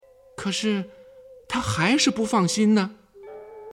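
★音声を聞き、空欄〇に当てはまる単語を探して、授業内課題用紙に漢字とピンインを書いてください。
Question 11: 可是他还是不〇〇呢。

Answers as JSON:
{"11": "放心"}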